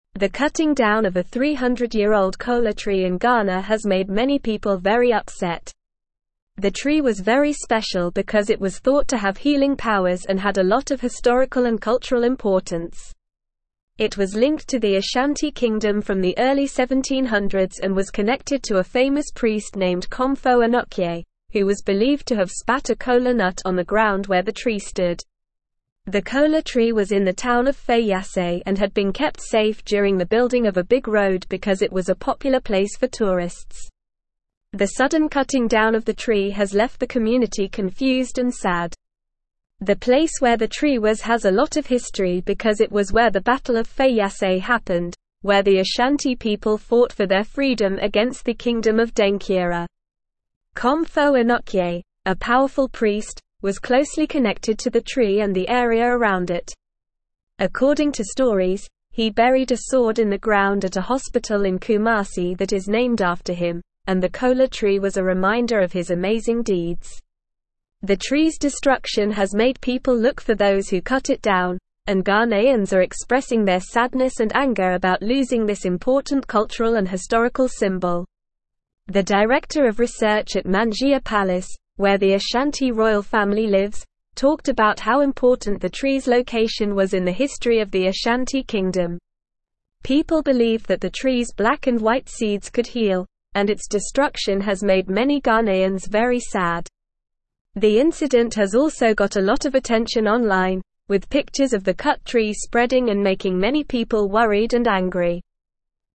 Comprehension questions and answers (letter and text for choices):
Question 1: Why was the 300-year-old kola tree in Ghana so special?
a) It was the tallest tree in Ghana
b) It was the only tree in the town of Feyiase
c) It was thought to have healing powers and had historical and cultural importance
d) It was the oldest tree in Africa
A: c) It was thought to have healing powers and had historical and cultural importance

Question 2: What was the kola tree linked to from the early 1700s?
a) The Ashanti Kingdom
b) The British Empire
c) The Egyptian civilization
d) The Roman Empire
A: a) The Ashanti Kingdom

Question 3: What happened at the place where the kola tree was located?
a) A big party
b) The Battle of Feyiase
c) A religious ceremony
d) A market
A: b) The Battle of Feyiase

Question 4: Who was Komfo Anokye?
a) A warrior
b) A king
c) A merchant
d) A famous priest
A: d) A famous priest

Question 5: What did Komfo Anokye do at the hospital in Kumasi?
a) Planted a kola tree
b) Buried a sword in the ground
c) Built a statue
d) Wrote a book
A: b) Buried a sword in the ground

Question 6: What is the director of research at Manhyia Palace talking about?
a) The weather in Ghana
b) The best places to visit in Ghana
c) The types of trees in Ghana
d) The importance of the tree's location in the history of the Ashanti Kingdom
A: d) The importance of the tree's location in the history of the Ashanti Kingdom

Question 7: What did people believe the kola tree's seeds could do?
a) Heal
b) Fly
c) Sing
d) Change color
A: a) Heal

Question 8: What has the incident of the tree's destruction caused among Ghanaians?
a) Happiness and excitement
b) Indifference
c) Sadness and anger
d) Confusion and surprise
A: c) Sadness and anger

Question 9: The tree was very special because it was thought to have healing powers and had a lot of historical and cultural (1)______.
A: importance

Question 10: It was (2)______ to the Ashanti (3)______ from the early 1700s and was connected to a famous priest named Komfo Anokye, who was (4)______ to have spat a kola nut on the ground where the tree stood.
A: linked

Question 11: It was (2)______ to the Ashanti (3)______ from the early 1700s and was connected to a famous priest named Komfo Anokye, who was (4)______ to have spat a kola nut on the ground where the tree stood.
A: Kingdom

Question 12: It was (2)______ to the Ashanti (3)______ from the early 1700s and was connected to a famous priest named Komfo Anokye, who was (4)______ to have spat a kola nut on the ground where the tree stood.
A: believed

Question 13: The kola tree was in the town of (5)______ and had been kept safe during the building of a big road because it was a popular place for tourists.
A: Feyiase

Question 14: The place where the tree was has a lot of history because it was where the Battle of Feyiase happened, where the (6)______ people fought for their freedom against the kingdom of (7)______.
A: Ashanti

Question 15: The place where the tree was has a lot of history because it was where the Battle of Feyiase happened, where the (6)______ people fought for their freedom against the kingdom of (7)______.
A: Denkyira

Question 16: Komfo (8)______, a powerful priest, was closely connected to the tree and the area around it.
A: Anokye

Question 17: According to stories, he buried a (9)______ in the ground at a hospital in (10)______ that is named after him, and the kola tree was a reminder of his amazing deeds.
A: sword

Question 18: According to stories, he buried a (9)______ in the ground at a hospital in (10)______ that is named after him, and the kola tree was a reminder of his amazing deeds.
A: Kumasi

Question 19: The tree's destruction has made people look for those who cut it down, and Ghanaians are expressing their sadness and anger about losing this important (11)______ and (12)______ symbol.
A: cultural

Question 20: The tree's destruction has made people look for those who cut it down, and Ghanaians are expressing their sadness and anger about losing this important (11)______ and (12)______ symbol.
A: historical

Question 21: The director of (13)______ at Manhyia Palace, where the Ashanti royal family lives, (14)______ about how important the tree's location was in the history of the Ashanti Kingdom.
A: research

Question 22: The director of (13)______ at Manhyia Palace, where the Ashanti royal family lives, (14)______ about how important the tree's location was in the history of the Ashanti Kingdom.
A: talked

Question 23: People believed that the tree's black and white seeds could heal, and its destruction has made many (15)______ very sad.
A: Ghanaians

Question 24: The incident has also got a lot of (16)______ online, with pictures of the cut tree spreading and making many people worried and angry.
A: attention

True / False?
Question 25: The tree was considered special because it was believed to have healing powers and had a lot of historical and cultural significance.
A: True

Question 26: A 300-year-old kola tree in Ghana was recently planted, causing a lot of excitement among the local people.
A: False

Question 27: The tree was located in the town of Feyiase and was spared during the construction of a road due to its popularity with tourists.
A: True

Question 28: Komfo Anokye, a powerless priest, was loosely connected to the tree and the area around it, and his deeds were forgotten through the tree.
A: False

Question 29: The gradual growth of the tree has left the community feeling enlightened and happy, as the tree was tied to the Battle of Feyiase, an insignificant historical event.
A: False

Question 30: The preservation of the tree has caused a lot of joy and contentment among Ghanaians, who are celebrating those responsible for planting it.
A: False

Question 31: The incident has gained attention online, with many people expressing their worry and anger over the loss of this important cultural and historical symbol.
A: True

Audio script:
The cutting down of a 300-year-old kola tree in Ghana has made many people very upset. The tree was very special because it was thought to have healing powers and had a lot of historical and cultural importance. It was linked to the Ashanti Kingdom from the early 1700s and was connected to a famous priest named Komfo Anokye, who was believed to have spat a kola nut on the ground where the tree stood.
The kola tree was in the town of Feyiase and had been kept safe during the building of a big road because it was a popular place for tourists. The sudden cutting down of the tree has left the community confused and sad. The place where the tree was has a lot of history because it was where the Battle of Feyiase happened, where the Ashanti people fought for their freedom against the kingdom of Denkyira.
Komfo Anokye, a powerful priest, was closely connected to the tree and the area around it. According to stories, he buried a sword in the ground at a hospital in Kumasi that is named after him, and the kola tree was a reminder of his amazing deeds. The tree's destruction has made people look for those who cut it down, and Ghanaians are expressing their sadness and anger about losing this important cultural and historical symbol.
The director of research at Manhyia Palace, where the Ashanti royal family lives, talked about how important the tree's location was in the history of the Ashanti Kingdom. People believed that the tree's black and white seeds could heal, and its destruction has made many Ghanaians very sad. The incident has also got a lot of attention online, with pictures of the cut tree spreading and making many people worried and angry.

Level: Level 3